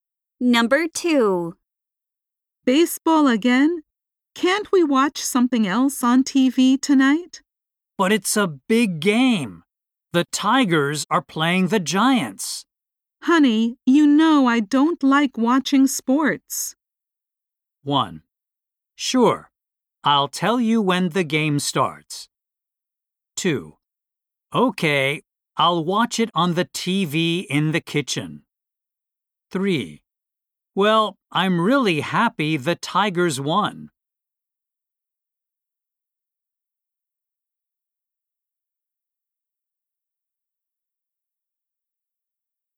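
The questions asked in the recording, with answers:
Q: Honey, you know I don't like watching sports.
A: 2: Okay, I'll watch it on the TV in the kitchen.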